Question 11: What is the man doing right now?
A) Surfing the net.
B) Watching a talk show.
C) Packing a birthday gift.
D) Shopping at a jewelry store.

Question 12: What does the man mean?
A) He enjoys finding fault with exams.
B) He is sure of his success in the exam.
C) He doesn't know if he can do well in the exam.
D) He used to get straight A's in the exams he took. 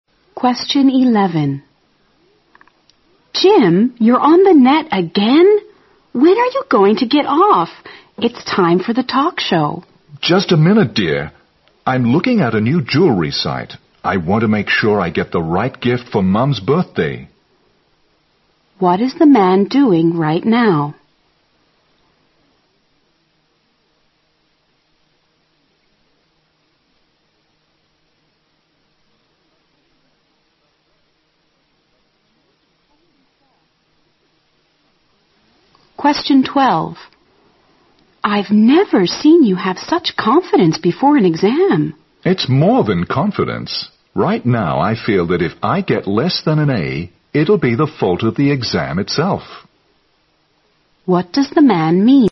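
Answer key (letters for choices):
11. A
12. B

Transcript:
When are you going to get off? It's the time for the talk show.
M: Just a minute, dear. I'm looking at a new jewelry site. I want to make sure I get the right gift for Mum's birthday.
Q: What is the man doing right now?
W: I've never seen you have such confidence before an exam.
M: It's more than confidence. Right now I feel that if I get less than an A, it'll be the fault of the exam itself.
Q: What does the man mean?

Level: 六级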